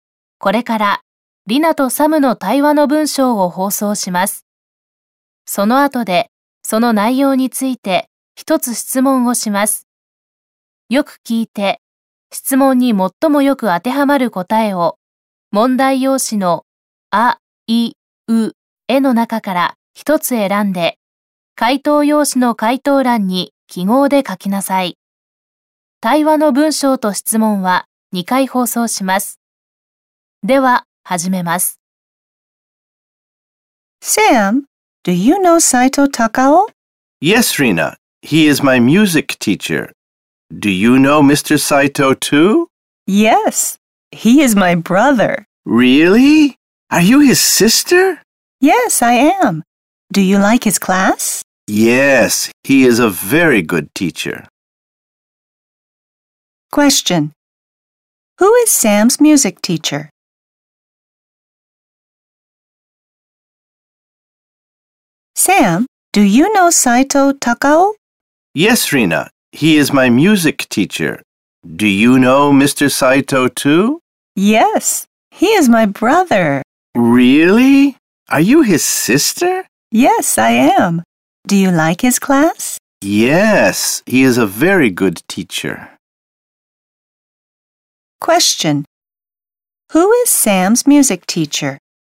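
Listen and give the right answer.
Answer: Mr. Saito, Rina's brother (Saito Takao)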